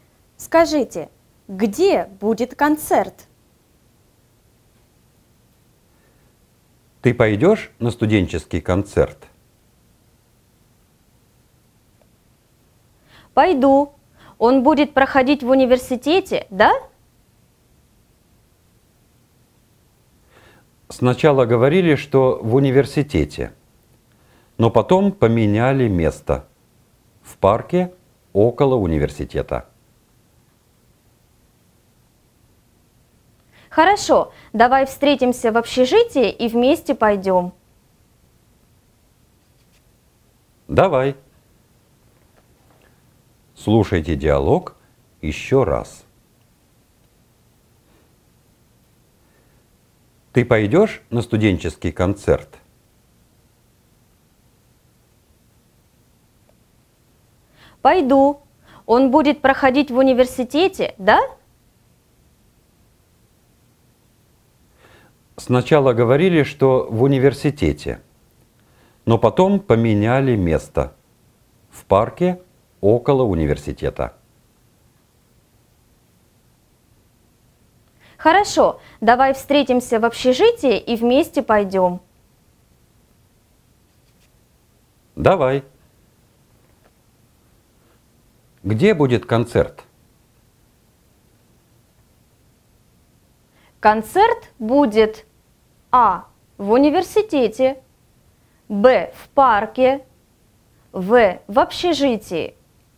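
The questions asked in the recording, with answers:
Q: Где будет концерт?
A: Б: В парке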